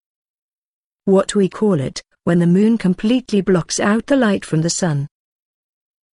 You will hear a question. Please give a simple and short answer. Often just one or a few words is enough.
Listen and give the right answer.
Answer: A solar eclipse/An eclipse